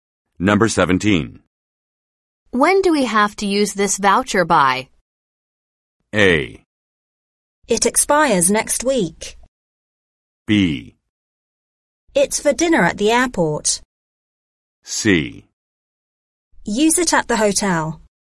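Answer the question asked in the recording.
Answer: A: It expires next week.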